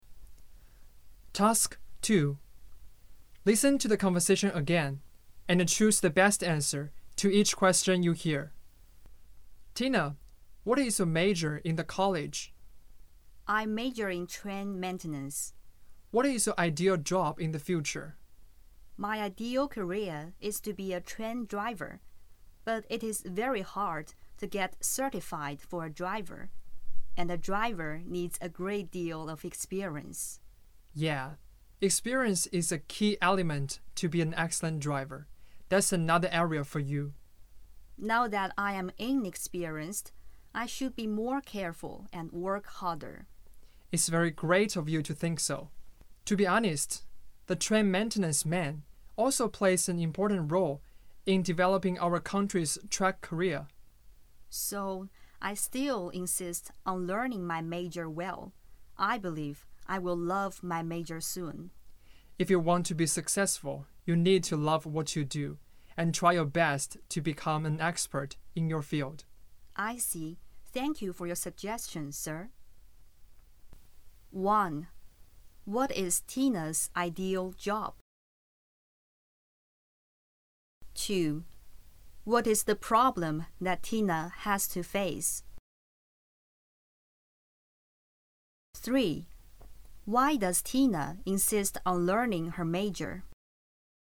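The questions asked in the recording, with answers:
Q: What is Tina's ideal job?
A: To be a train driver

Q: Why does Tina insist on learning her major?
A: Train maintenance also plays an important role in developing the country's track career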